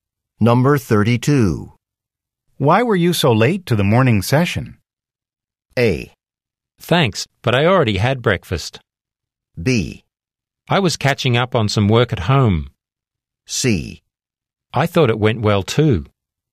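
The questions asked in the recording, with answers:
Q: Why were you so late to the morning session?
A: B: I was catching up on some work at home.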